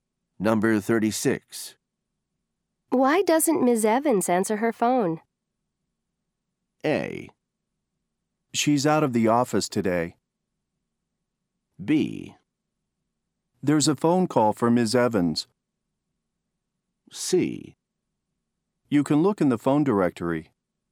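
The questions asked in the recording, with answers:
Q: Why doesn't Ms. Evans answer her phone?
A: A: She's out of the office today.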